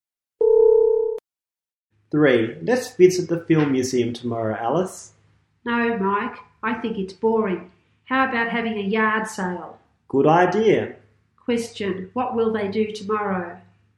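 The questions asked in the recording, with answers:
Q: Question. What will they do tomorrow?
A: Have a yard sale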